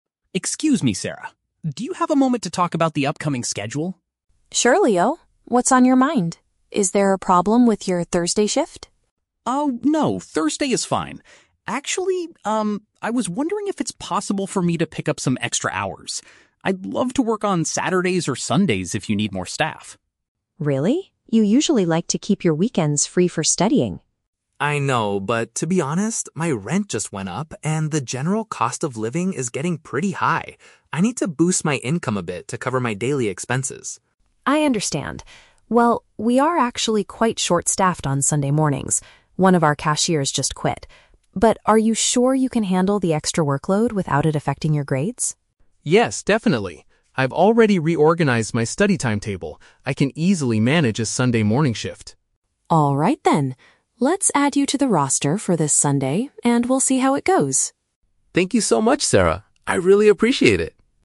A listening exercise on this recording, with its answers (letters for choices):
Listen to a conversation between a part-time employee and a store manager, then choose the correct answer (A, B, or C) for each question.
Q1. What is the employee's main request?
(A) To change his current Thursday schedule.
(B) To work additional time at the store.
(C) To get a higher hourly wage for his position.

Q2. What motivated the employee to make this request?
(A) He needs to pay for expensive university materials.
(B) His accommodation and daily costs have become more expensive.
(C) He wants to save money to rent a better apartment.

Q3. What is the manager's decision at the end of the conversation?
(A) She will assign him to work on the weekend.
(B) She will hire a new cashier to reduce his workload.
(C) She will give him extra shifts every day of the week.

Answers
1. B
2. B
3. A

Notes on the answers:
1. Leo asks if it is possible to "pick up some extra hours." "Work additional time" is a direct paraphrase of picking up extra hours.
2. Leo explains that his "rent just went up" and the "cost of living is getting pretty high." This means his accommodation (rent) and daily costs (cost of living) have become more expensive.
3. Sarah agrees to "add you to the roster for this Sunday." Working on Sunday is working on the weekend.

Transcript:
Leo: Excuse me, Sarah. Do you have a moment to talk about the upcoming schedule?
Sarah: Sure, Leo. What's on your mind? Is there a problem with your Thursday shift?
Leo: Oh, no, Thursday is fine. Actually, um, I was wondering if it's possible for me to pick up some extra hours. I'd love to work on Saturdays or Sundays if you need more staff.
Sarah: Really? You usually like to keep your weekends free for studying.
Leo: I know, but to be honest, my rent just went up, and the general cost of living is getting pretty high. I need to boost my income a bit to cover my daily expenses.
Sarah: I understand. Well, we are actually quite short-staffed on Sunday mornings. One of our cashiers just quit. But are you sure you can handle the extra workload without it affecting your grades?
Leo: Yes, definitely. I've already reorganized my study timetable. I can easily manage a Sunday morning shift.
Let's add you to the roster for this Sunday, and we'll see how it goes.